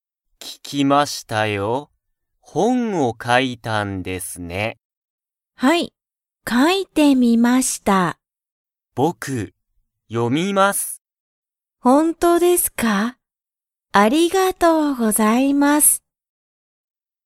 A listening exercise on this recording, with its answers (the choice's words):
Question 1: 上野(うえの)さんは、山口(やまぐち)さんの本(ほん)を読(よ)みたいですか?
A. はい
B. いいえ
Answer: はい

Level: Level 1